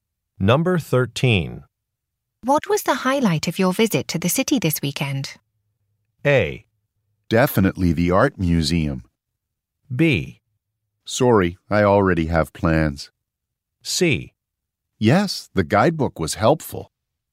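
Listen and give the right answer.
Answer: A: Definitely the art museum.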